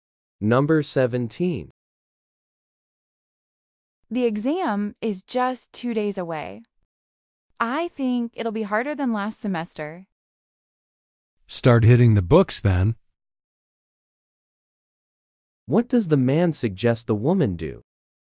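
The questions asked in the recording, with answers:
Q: What does the man suggest the woman do?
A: Start studying hard.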